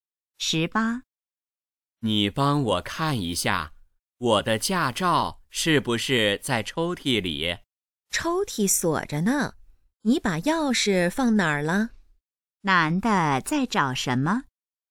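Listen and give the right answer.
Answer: 驾照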